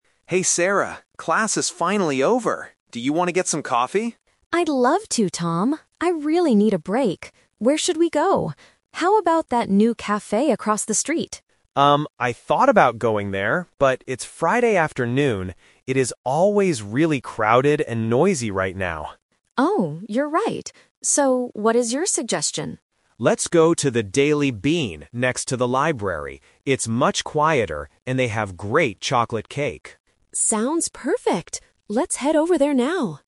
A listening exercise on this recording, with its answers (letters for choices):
Listen to the conversation and choose the best answer (A, B, or C) for each question.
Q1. Where are they going to get coffee?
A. At the café across the street.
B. At the Daily Bean.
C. In the school library.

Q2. Why doesn't Tom want to go to the first café?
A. It is too busy and loud.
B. It is closed on Fridays.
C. The coffee is too expensive.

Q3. What does Tom say about the Daily Bean?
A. It is a brand new café.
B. It has very good cake.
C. It is a fun and noisy place.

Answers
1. B
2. A
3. B

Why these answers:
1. Tom suggests going to the Daily Bean, and Sarah agrees by saying "Sounds perfect!". Option (A) is the trap because Sarah mentions the café across the street first, but they decide not to go there. Option (C) is a distractor because the Daily Bean is next to the library, not inside it.
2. Tom says the first café is "crowded and noisy," which means the same as busy and loud. Option (B) is a trap because he mentions "Friday," but he doesn't say it is closed. Option (C) is a plausible reason but is never mentioned in the audio.
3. Tom explicitly states that the Daily Bean has "great chocolate cake." Option (A) is a trap because the "new café" is the one across the street, not the Daily Bean. Option (C) is also a trap because Tom says the Daily Bean is "quieter," not noisy.

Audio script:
Tom: Hey Sarah, class is finally over! Do you want to get some coffee?
Sarah: I'd love to, Tom. I really need a break. Where should we go? How about that new café across the street?
Tom: Um, I thought about going there, but it's Friday afternoon. It is always really crowded and noisy right now.
Sarah: Oh, you're right. So, what is your suggestion?
Tom: Let's go to the Daily Bean next to the library. It's much quieter, and they have great chocolate cake.